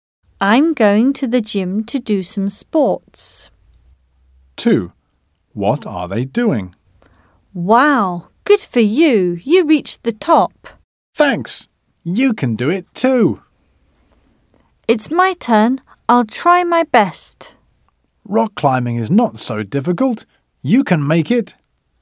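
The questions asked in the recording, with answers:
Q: What are they doing?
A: Rock climbing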